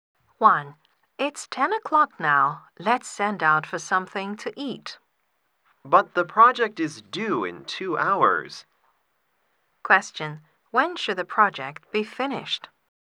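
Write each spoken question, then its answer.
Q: When should the project be finished?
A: At 12 o'clock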